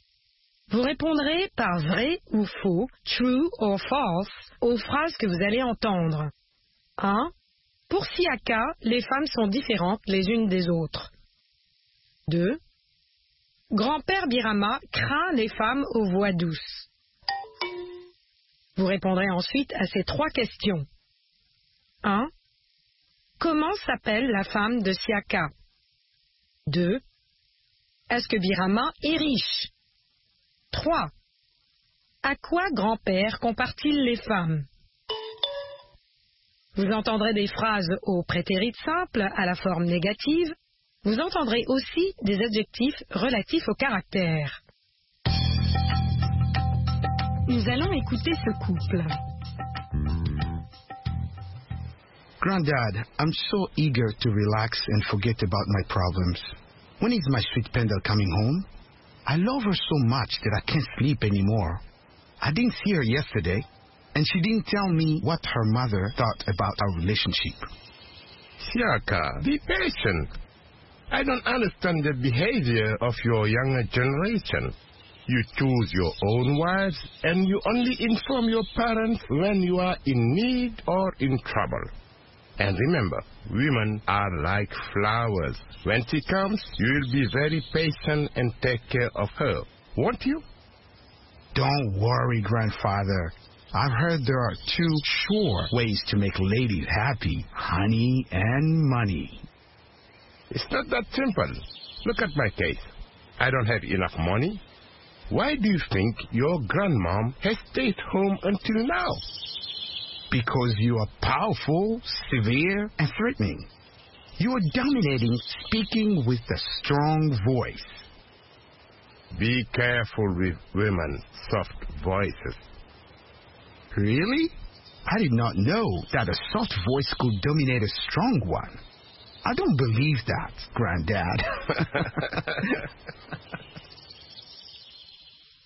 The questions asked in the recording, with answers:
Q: Pour Siaka, les femmes sont différentes les unes des autres.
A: l'énoncé 1 est faux.

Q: Grand-père Birama craint les femmes aux voix douces.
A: L'énoncé 2 est vrai.

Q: Comment s'appelle la femme de Siaka?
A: La femme de Siaka s'appelle Pendel.

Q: Est-ce que Birama est riche?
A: Non, Birama n'est pas riche, mais patient.

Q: À quoi grand-père compare-t-il les femmes?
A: Grand-père compare les femmes aux fleurs.